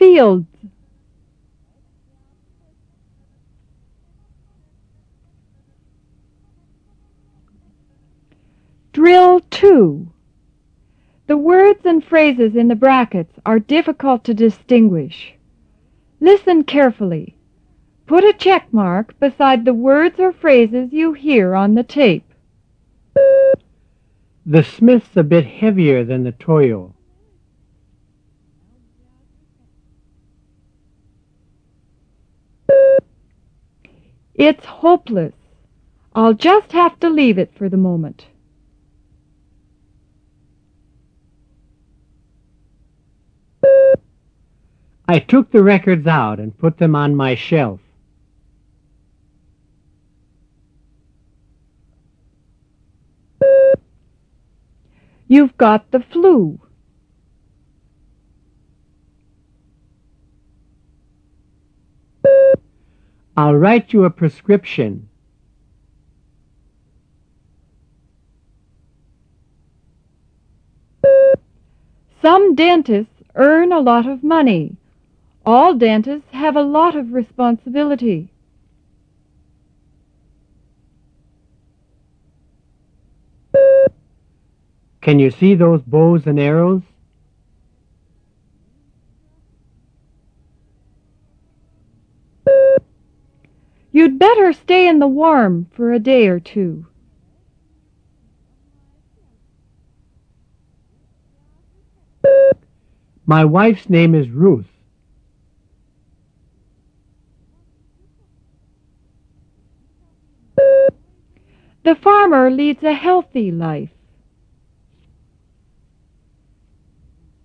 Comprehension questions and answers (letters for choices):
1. The Smith's a bit (heavier----handier) than the Toyo.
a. heavier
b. handier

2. It's (helpless----hopeless). I'll just have to leave it for the moment.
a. helpless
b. hopeless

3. I took the records out and put them on (myself----my shelf).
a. myself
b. my shelf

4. You've got (the flu----the clue).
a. the flu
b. the clue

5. I'll write you a (prescription----description).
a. prescription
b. description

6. Some dentists (own----earn) a lot of money; all dentists have a lot of responsibility.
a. own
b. earn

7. Can you see those (bows----bones) and arrows?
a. bows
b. bones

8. You'd better stay in the (warm----room) for a day or two.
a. warm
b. room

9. My wife's name is (Rose----Ruth).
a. Rose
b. Ruth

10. The farmer leads a (healthy----wealthy) life.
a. healthy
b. wealthy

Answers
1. a
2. b
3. b
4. a
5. a
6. b
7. a
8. a
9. b
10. a